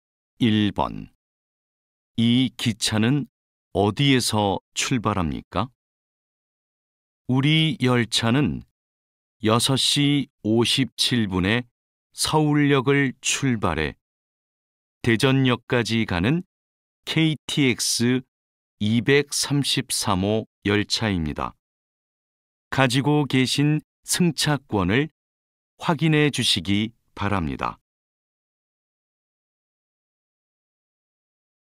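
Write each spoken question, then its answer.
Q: 이 기차는 어디에서 출발합니까?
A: 서울역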